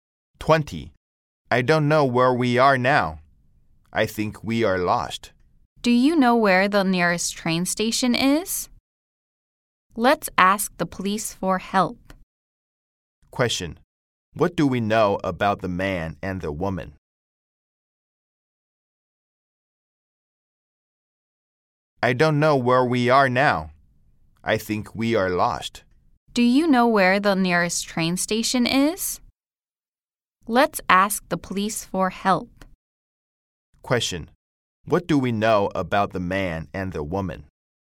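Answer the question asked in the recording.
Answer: They are lost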